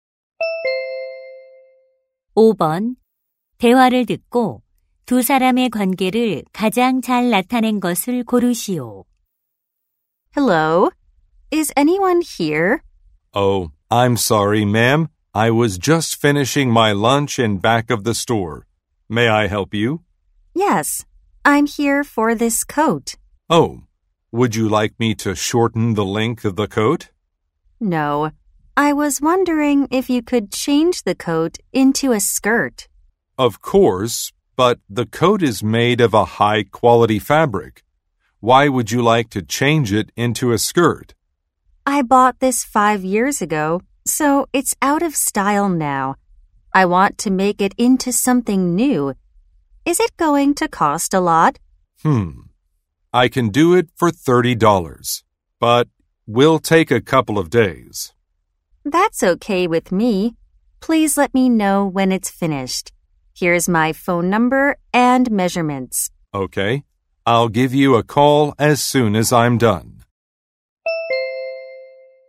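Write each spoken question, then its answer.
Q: 대화를 듣고 두 사람의 관계를 가장 잘 나타낸 것을 고르시오.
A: 손님 - 옷 수선사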